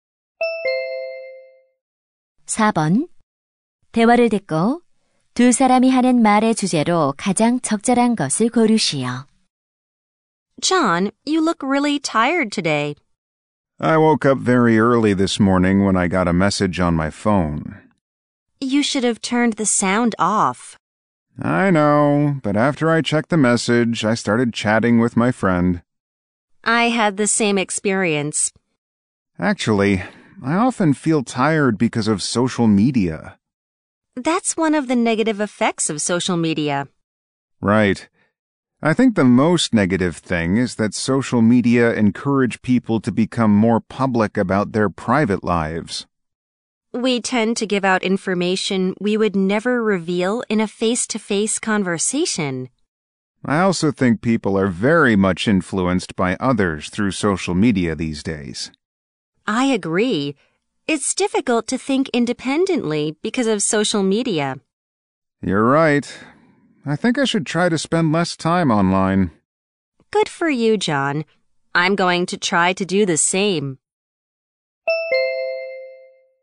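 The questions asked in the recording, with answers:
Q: 대화를 듣고 두 사람이 하는 말의 주제로 가장 적절한 것을 고르시오.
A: 소셜 미디어의 부정적인 영향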